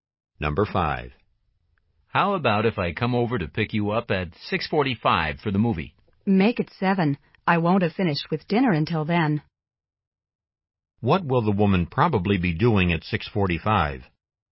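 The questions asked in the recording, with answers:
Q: What will the woman probably be doing at 6:45?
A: Eating dinner.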